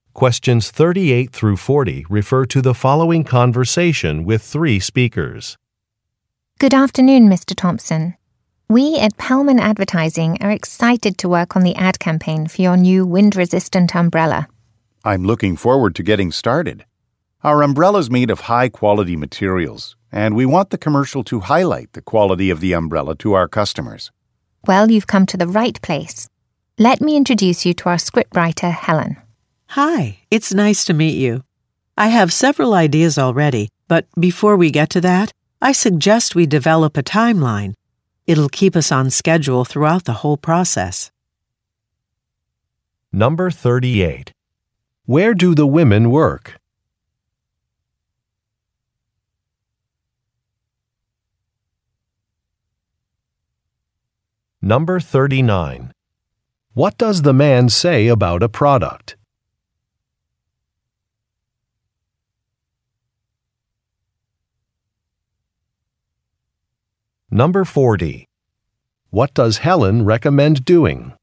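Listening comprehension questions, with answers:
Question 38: Where do the women work?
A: At an advertising firm

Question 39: What does the man say about a product?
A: It is made of quality materials.

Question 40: What does Helen recommend doing?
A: Developing a timeline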